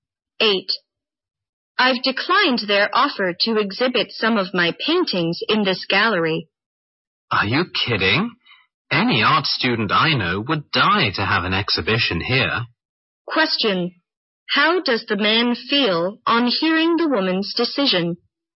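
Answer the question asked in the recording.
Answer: Surprised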